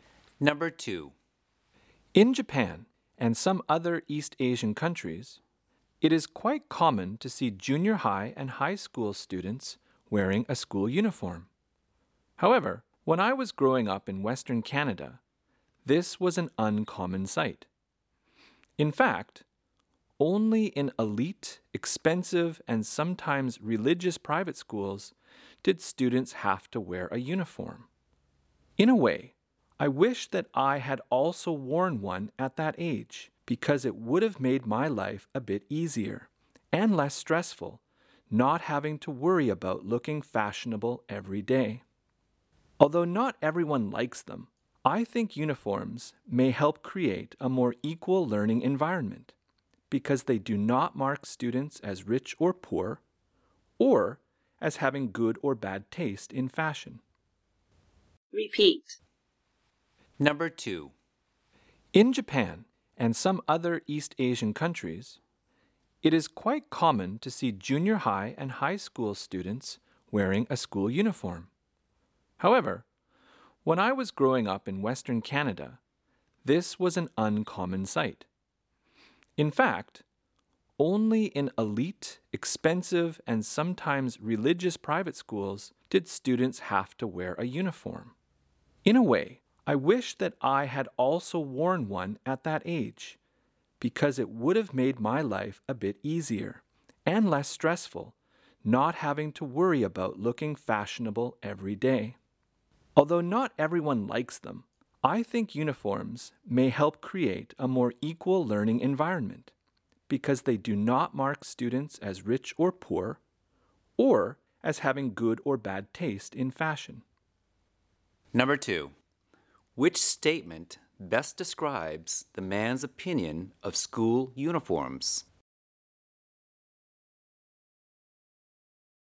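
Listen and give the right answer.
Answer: He thinks they help create a more equal learning environment and reduce stress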